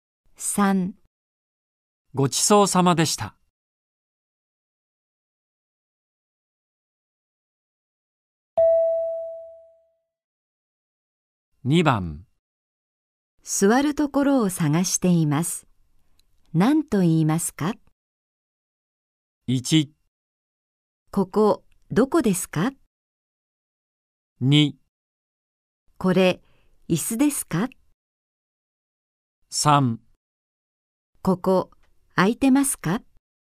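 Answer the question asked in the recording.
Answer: 3: ここ空いてますか?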